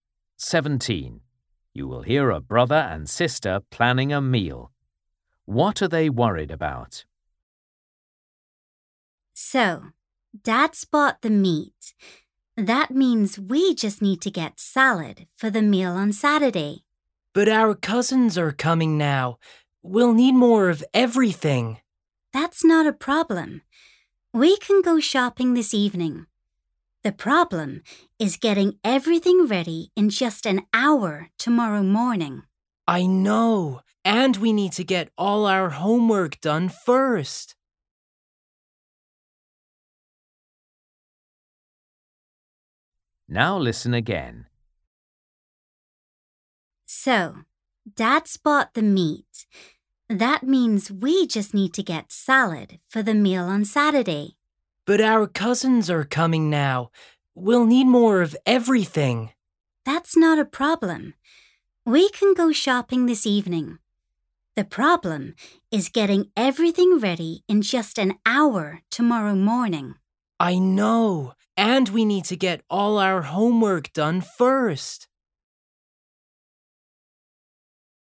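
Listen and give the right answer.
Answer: Having only an hour to get everything ready tomorrow morning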